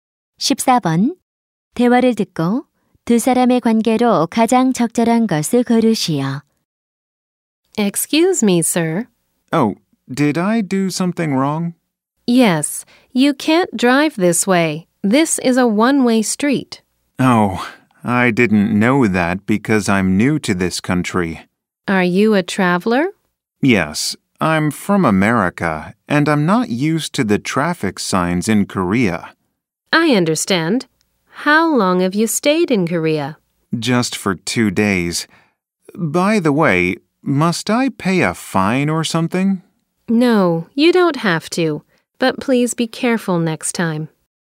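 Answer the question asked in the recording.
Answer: 경찰관과 운전자(여행객)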